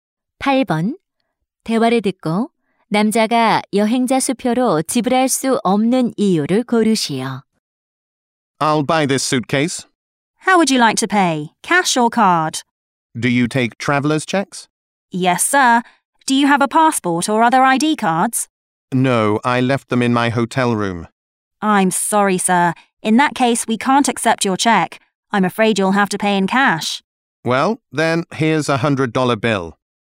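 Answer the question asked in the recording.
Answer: 여권이나 신분증을 호텔에 두고 와서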